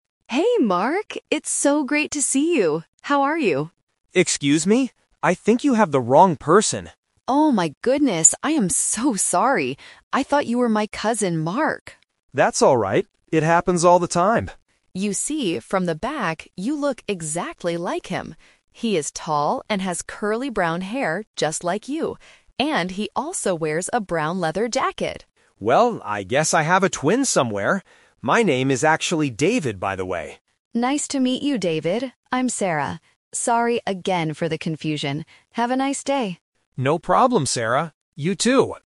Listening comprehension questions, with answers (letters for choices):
Listen to the conversation between two people on the street. Choose the correct answer (A, B, or C) for each question.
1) Who did Sarah think the man was?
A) Her brother.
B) Her cousin.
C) Her husband.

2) What is the man's real name?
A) Mark.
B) David.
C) Sarah.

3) Why did Sarah make a mistake?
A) Because she planned to meet her cousin there.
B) Because the man was calling her name.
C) Because the man has the same hair and jacket as her cousin.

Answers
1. B
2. B
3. C

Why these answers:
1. Sarah apologizes and says, "I thought you were my cousin, Mark." Option (A) is a plausible family member but is not mentioned. Option (C) is also not mentioned in the audio.
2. This uses the "Trap" logic with names. Sarah calls him "Mark" at first (Option A - the trap), but that is her cousin's name. The man later introduces himself: "My name is actually David". Option (C) is a trap because Sarah is the woman's name.
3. Sarah explains her mistake by saying, "He is tall and has curly brown hair just like you. And he also wears a brown leather jacket!" Option (A) is a trap because meeting a cousin is plausible, but she didn't plan it; it was an accident. Option (B) is incorrect because the man didn't know her.

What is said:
Sarah: Hey, Mark! It's so great to see you! How are you?
David: Excuse me? I think you have the wrong person.
Sarah: Oh my goodness, I am so sorry! I thought you were my cousin, Mark.
David: That's alright. It happens all the time.
Sarah: You see, from the back, you look exactly like him. He is tall and has curly brown hair just like you. And he also wears a brown leather jacket!
David: Well, I guess I have a twin somewhere! My name is actually David, by the way.
Sarah: Nice to meet you, David. I'm Sarah. Sorry again for the confusion! Have a nice day!